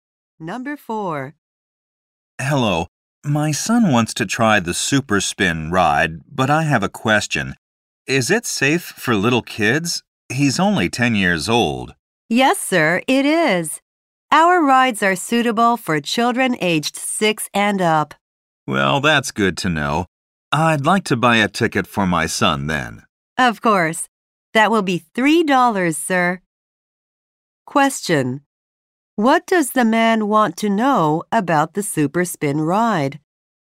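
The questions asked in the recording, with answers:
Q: What does the man want to know about the Super Spin ride?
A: Whether it is safe for little kids.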